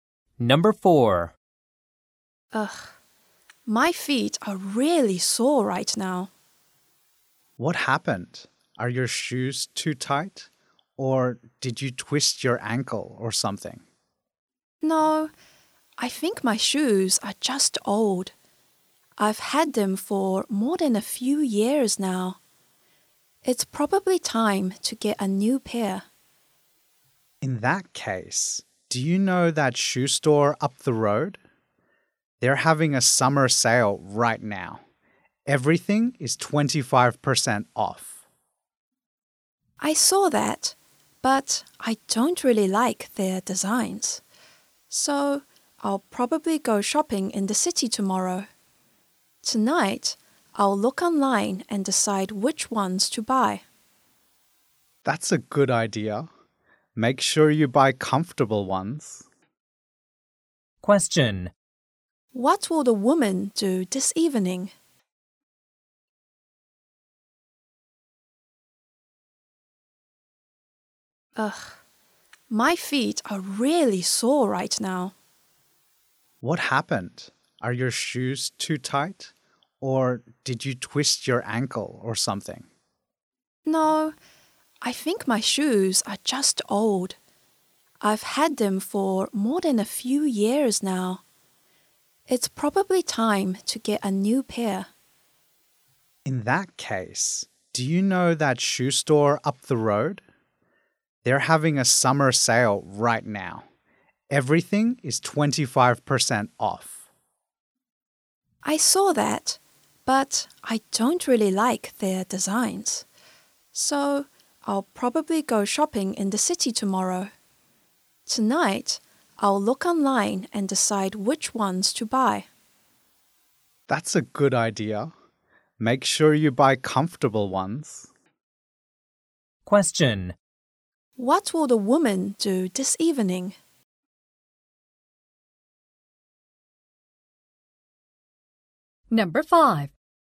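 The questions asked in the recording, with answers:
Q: What will the woman do this evening?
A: Look online and decide which new shoes to buy.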